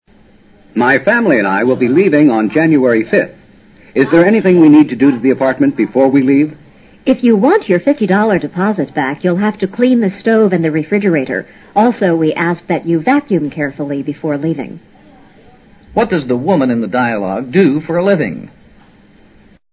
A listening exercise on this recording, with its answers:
What does the woman in the dialogue do for a living?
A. She's a maid.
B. She sells stoves and refrigerators.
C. She's an apartment manager.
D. She's a real estate agent.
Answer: C. She's an apartment manager.

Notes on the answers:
这是住户与房产管理人员之间的对话。住户要迁居,询问搬走前要办些什么事。管理人员则告之要清理火炉(多指煤气灶),冰箱,并将居室清扫干净。否则他们不能取回压金(deposit)。此题较难,因为多数中国读者对外国租房情况不甚了解,不过,如果对选择答案中的某些词义熟悉,也可用排除法进行选择。Maid是雇用的女工,显然不会要求(we ask)住户做这做那。可以排除A。B较容易排除。Real estate agent是房产经纪人。对话并未涉及买房或卖房,所以也可排除D。一般出租的住房都是提供有煤气灶和冰箱,住户搬走之前应清理干净。租房时除付每月房租外,多此一举这须交纳一定的压金。如住户毁约搬走,或不按合同规定清理干净住房就搬走,则不能收回压金。vacuum: 用吸尘器打扫。

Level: 世博高级听说

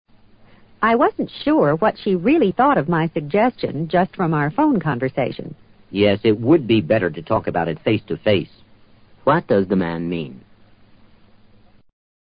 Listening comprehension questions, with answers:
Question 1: What does the man mean?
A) The situation looks better than it is.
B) The phone connection was bad.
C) The women ought to speak to each other in person.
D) It's better to be courageous.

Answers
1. C) The women ought to speak to each other in person.

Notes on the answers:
face to face是状语短语,作"面对面地"解,其含义与in person基本相同。 courageous:勇敢的。与原句义无关。

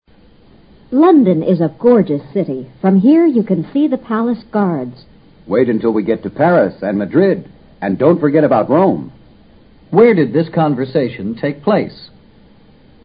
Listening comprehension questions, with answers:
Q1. Where did this conversation take place?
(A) In Rome.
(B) In Paris.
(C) In London.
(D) In Madrid.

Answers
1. (C) In London.

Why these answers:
从男子说wait until ... Rome 两句话可以判断他们是在London说话。 gorgeous:极美的。 Paris :巴黎。Madrid: 马德里,西班牙首都。Rome:罗马,意大利首都。

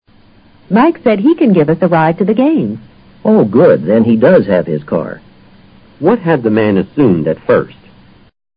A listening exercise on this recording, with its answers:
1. What had the man assumed at first?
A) Mike's friends didn't plan to go to the game.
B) All of them couldn't ride in the woman's car.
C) Mike had a scar on his ear.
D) Mike's car wasn't available.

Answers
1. D) Mike's car wasn't available.

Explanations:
Then he does have his car 是强调句式,含意是他本来以为Mike 是不可能用车送他们看球赛去的。Mike's car wasn't available 就是他原先的想法。give somebody a ride: 让...搭车。game通常指体育竞赛。

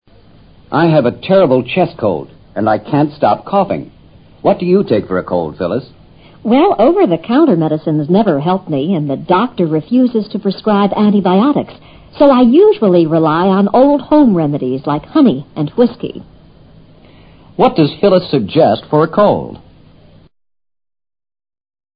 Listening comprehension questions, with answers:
What does Phyllis suggest for a cold?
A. Cough medicine.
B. Honey and whiskey.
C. Antibiotics.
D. Over - the - counter remedies.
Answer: B. Honey and whiskey.

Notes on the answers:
她以自己的经验向他推荐传统偏方(honey and whiskey)。coughing : 咳嗽。over - the - counter medicines: (柜台上的)成药。prescribe :开处方。antibiotics: 抗菌素(药物)。remedies: 药物。whiskey: 威士忌酒。

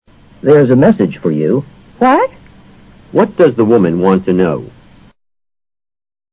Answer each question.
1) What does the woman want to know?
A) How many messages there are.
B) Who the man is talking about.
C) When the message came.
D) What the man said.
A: D) What the man said.

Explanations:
What? = What did you say? 口语是常见的省略句。在未听清或未听懂对方所说的话时,要求对方重复一遍。message指口信,便条等。

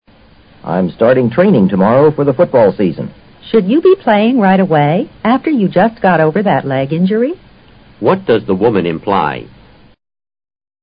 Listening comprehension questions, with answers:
What does the woman imply?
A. The man should step over the football.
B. The man shouldn't be taking the train tomorrow.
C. The man should see the game afterward.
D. The man shouldn't be playing so soon.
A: D. The man shouldn't be playing so soon.

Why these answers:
女方对他腿伤刚好就开始训练提出疑问,自然是含有他不应这么快就开始活动的意思。football season 指赛事频繁的秋季。football 在美国指橄榄球运动。injury: 伤,受伤处。

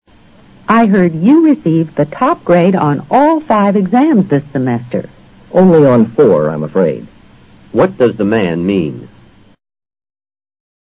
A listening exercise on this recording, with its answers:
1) What does the man mean?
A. He's afraid to take exams.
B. He only took the fourth exam.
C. He didn't get the highest score on one exam.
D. He isn't the only one who was graded.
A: C. He didn't get the highest score on one exam.

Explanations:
Only on four = I received the top grade only on four exams. 这个意思与C是一致的,只是叙述的角度不同。top grade与highest score同义,作"最高分"解。

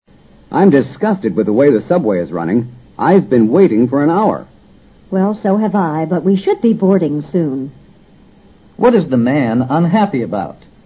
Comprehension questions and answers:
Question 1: What is the man unhappy about?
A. He arrived at the subway station late.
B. The subway Is not on time.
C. The subway left an hour ago.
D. The woman kept him from boarding the subway.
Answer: B. The subway Is not on time.

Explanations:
他的不满主要是针对地铁的管理的(I'm disgusted with the way the subway is running)。答案是根据他说话的内容做出的推断。The subway is not on time 意思是"地铁不正点运行"。 board: 登车。

